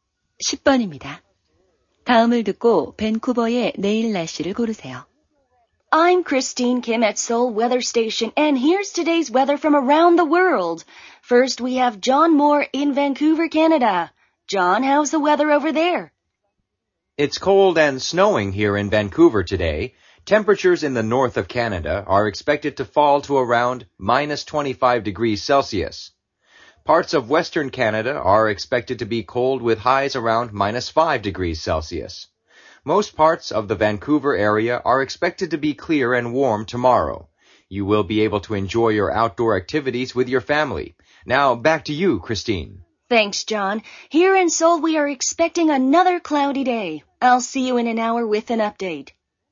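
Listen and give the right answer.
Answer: 맑고 따뜻함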